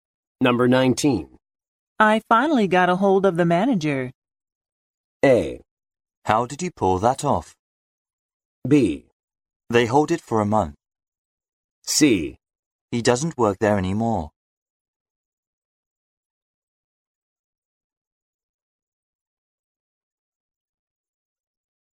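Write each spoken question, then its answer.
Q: I finally got a hold of the manager.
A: A: How did you pull that off?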